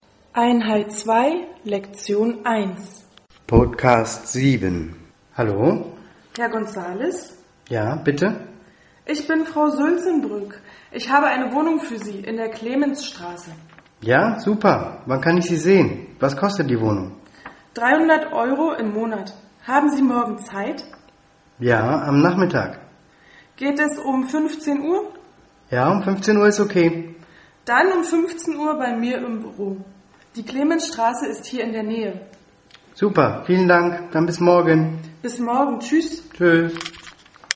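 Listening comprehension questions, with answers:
Hören Sie den Dialog. Welche Informationen sind richtig? Kreuzen Sie sie an.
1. Die Immobilienmaklerin heißt Manuela.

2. Die Immobilienmaklerin hat ein Haus für Manuel.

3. Die Wohnung kostet 300€ im Monat.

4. Die Wohnung ist in der Sülzenbrückstraße.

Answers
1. falsch
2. falsch
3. richtig
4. falsch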